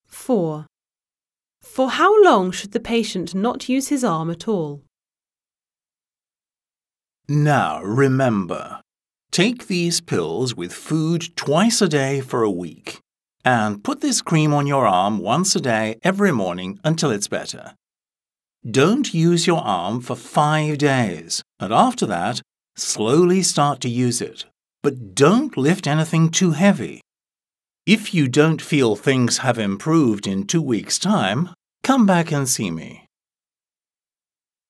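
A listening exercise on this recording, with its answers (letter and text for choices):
1. Listen to the recording. Choose the correct answer A, B or C. Mark your answers on your answer sheet. (Прослухайте сім окремих аудіозаписів та оберіть одну правильну відповідь AB або C до кожного діалогу або монологу )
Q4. For how long should the patient not use his arm at all?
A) for two weeks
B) for five days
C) for a week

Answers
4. B) for five days

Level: 9-Б клас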